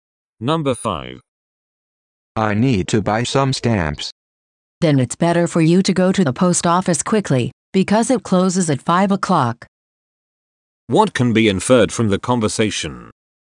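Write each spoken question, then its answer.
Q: What can be inferred from the conversation?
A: The post office closes at 5 o'clock, so the man should hurry.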